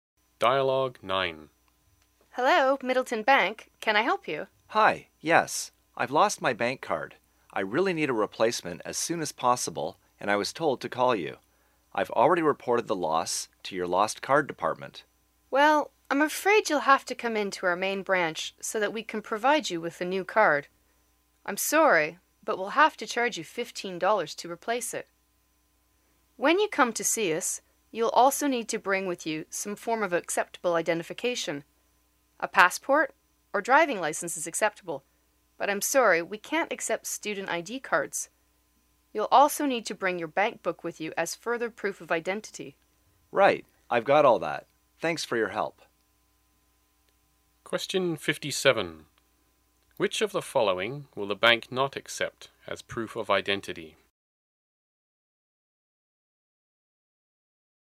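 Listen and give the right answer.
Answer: A student ID card.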